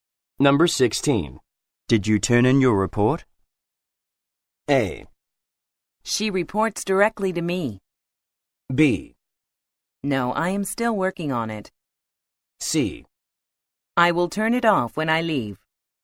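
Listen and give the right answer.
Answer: B: No, I am still working on it.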